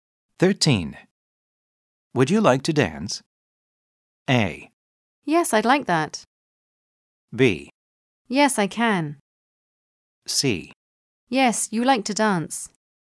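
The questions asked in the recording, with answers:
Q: Would you like to dance?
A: A: Yes, I'd like that.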